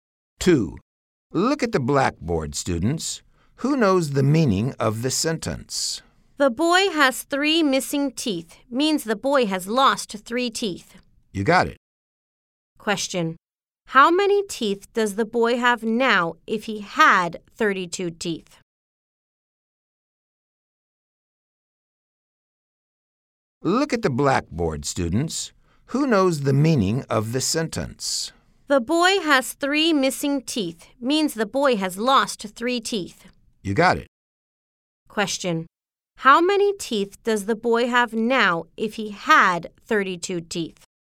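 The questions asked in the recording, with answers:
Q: How many teeth does the boy have now if he had 32 teeth?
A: 29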